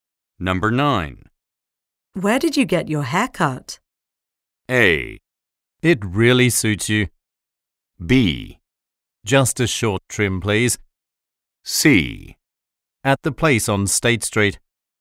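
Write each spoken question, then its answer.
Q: Where did you get your haircut?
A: C: At the place on State Street.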